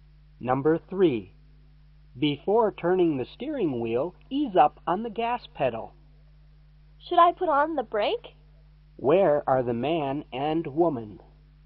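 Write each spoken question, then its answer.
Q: Where are the man and woman?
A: In a car, during a driving lesson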